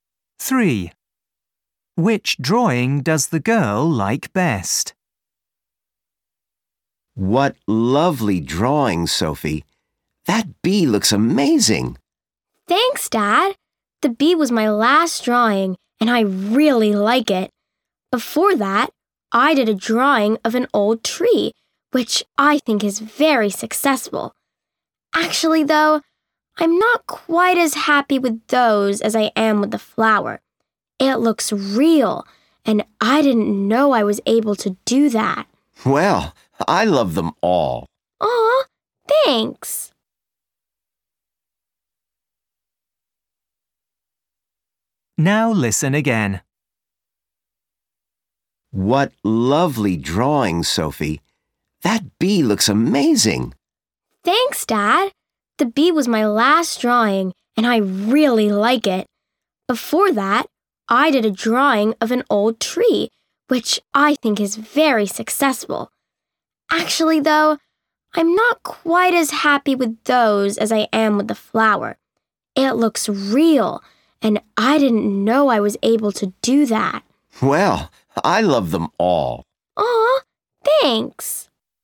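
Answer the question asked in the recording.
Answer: the flower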